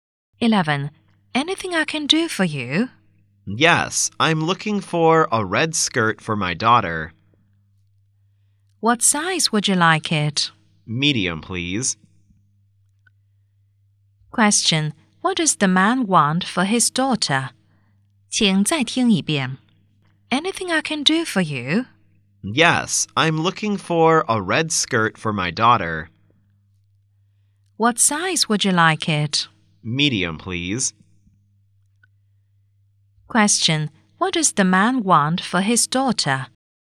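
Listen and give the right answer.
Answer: A red skirt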